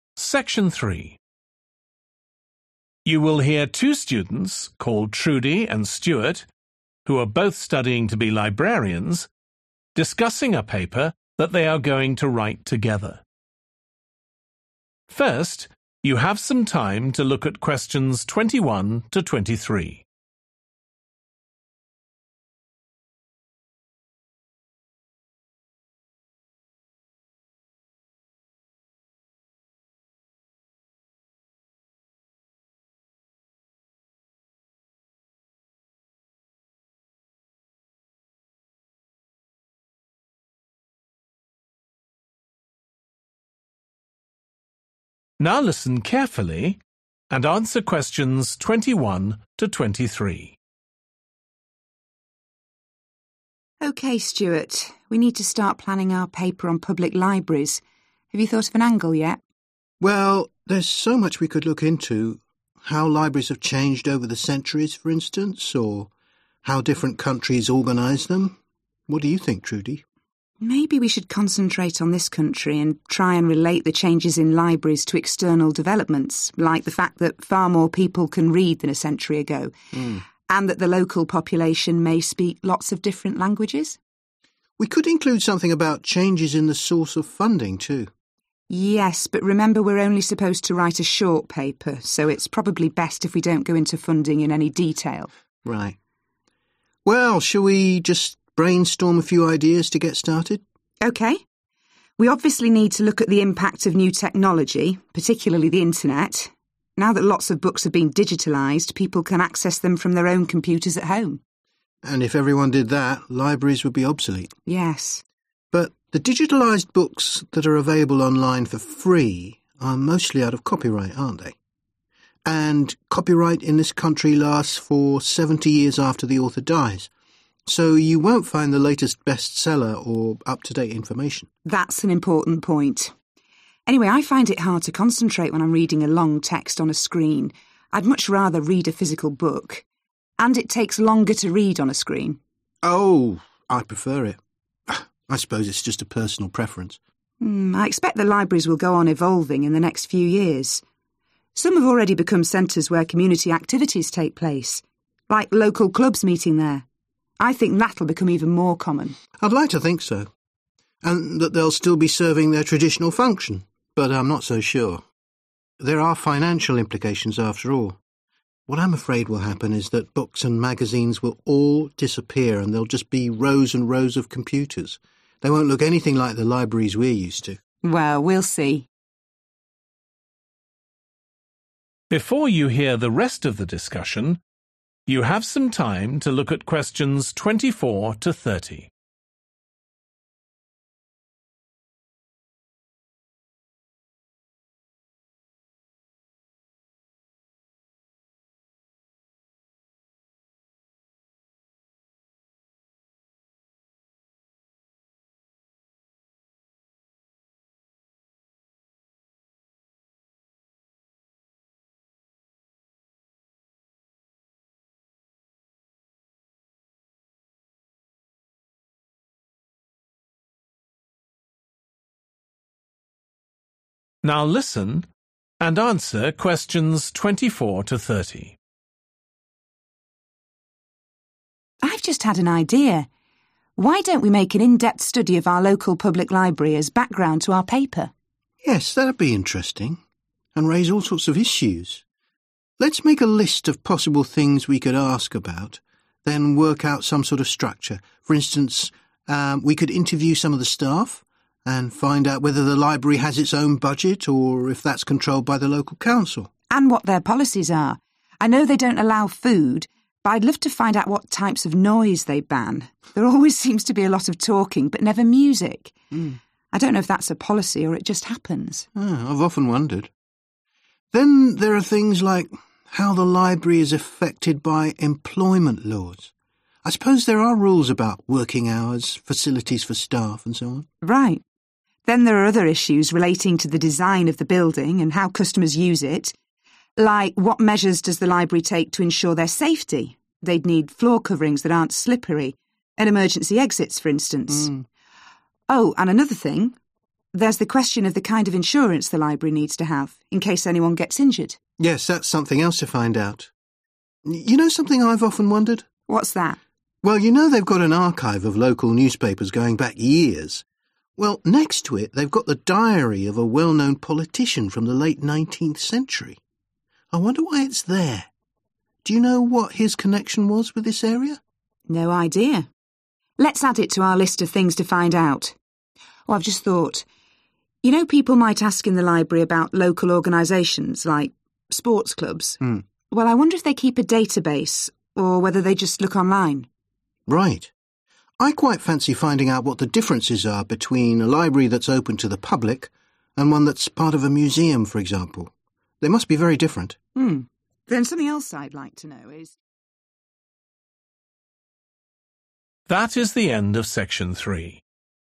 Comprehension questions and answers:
Questions 21 – 23. Choose the correct letter, A, B or C.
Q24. whether it has a 24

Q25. how it's affected by laws regarding all aspects of 25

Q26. how the design needs to take the 26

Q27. what 27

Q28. why a famous person's 28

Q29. whether it has a 29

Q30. how it's different from a library in a 30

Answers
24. budget
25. employment
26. safety
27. insurance
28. diary
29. database
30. museum